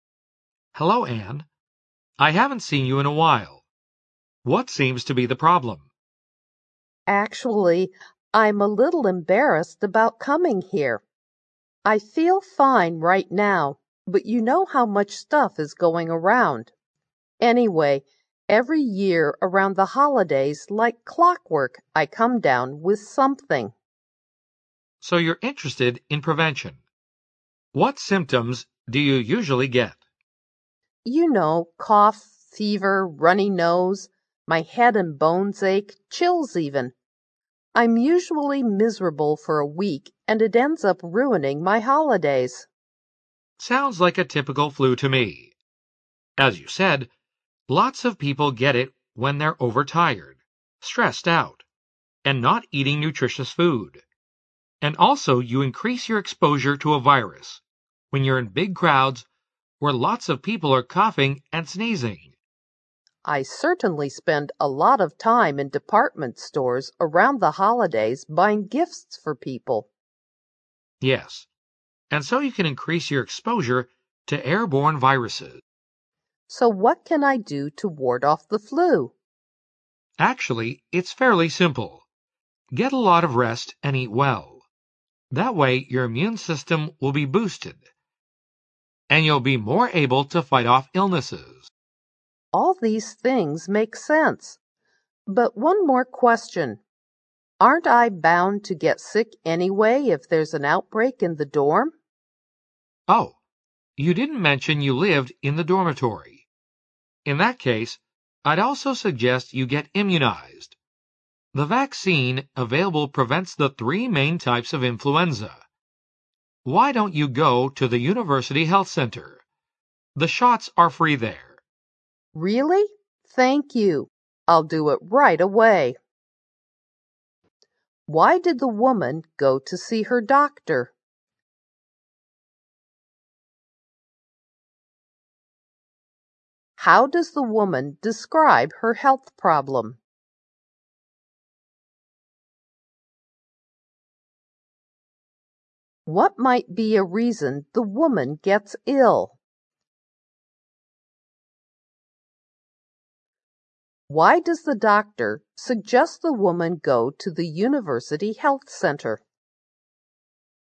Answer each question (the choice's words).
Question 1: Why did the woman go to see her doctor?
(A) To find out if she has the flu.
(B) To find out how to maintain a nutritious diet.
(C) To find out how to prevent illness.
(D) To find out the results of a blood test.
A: To find out how to prevent illness.

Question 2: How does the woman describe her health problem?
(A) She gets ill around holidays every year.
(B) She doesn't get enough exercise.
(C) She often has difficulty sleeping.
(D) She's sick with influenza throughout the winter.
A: She gets ill around holidays every year.

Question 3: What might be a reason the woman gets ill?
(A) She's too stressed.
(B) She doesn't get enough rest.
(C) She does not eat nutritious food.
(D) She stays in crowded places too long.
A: She stays in crowded places too long.

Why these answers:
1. 男士说:"所以你对预防(疾病)感兴趣",选项C符合题意。A表述与录音不符;B中的nutritious diet和D中的blood test录音没有提到。
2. 对话中女士说:"每年在假日的时候我就会生病,好像有规律一样",可以得出答案A。D项的干扰性颇大,throughout the winter录音没有提及。
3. 对话中女士说:"我假日期间花了大量时间在百货商店里买礼物给朋友",选项D为同义表达。待的时间太长而容易染病,讲话的人越啰唆,解题的人越轻松。

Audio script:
I haven't seen you in a while. What seems to be the problem? W: Actually I'm a little embarrassed about coming here. I feel free right now, but you know how much stuff is going around. Anyway every year around the holidays like clockwork I come down with something. M: So you're interested in prevention. What symptoms do you usually get? W: You know, cough, fever, runny nose, my head and bones ache, chills even. I'm usually miserable for a week and it ends up ruining my holidays. M: Sounds like a typical flu to me. As you said, lots of people get it when they're overtired, stressed out and not eating nutritious food. And also you increase your exposure to a virus when you're in big crowds where lots of people are coughing and sneezing. W: I certainly spend a lot time in department stores around the holidays buying gifts for people. M: Yes. W: So what can I do to ward off the flu? M: Actually it's fairly simple. Get a lot of rest and eat well. That way your immune system will be boosted. And you'll be more able to fight off illnesses. W: All these things make sense. But one more question. Aren't I bound to get sick anyway if there's an outbreak in the dorm? M: Oh, you didn't mention you lived in the dormitory. In that case I'd also suggest you get immunized. The vaccine available prevents the three main types of influenza. Why don't you go to the university health center? The shots are free there. W: Really! Thank you. I'll do it right away.

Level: 大学英语六级